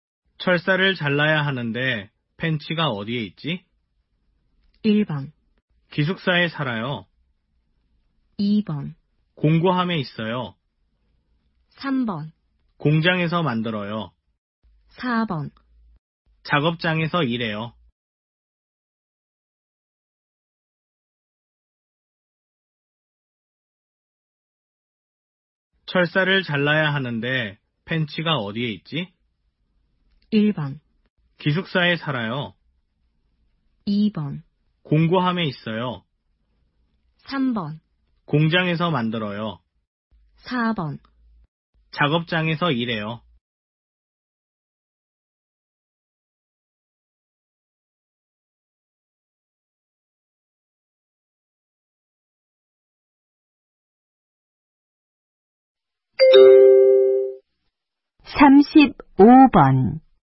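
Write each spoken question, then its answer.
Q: 철사를 잘라야 하는데 펜치가 어디에 있지?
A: 2: 공구함에 있어요.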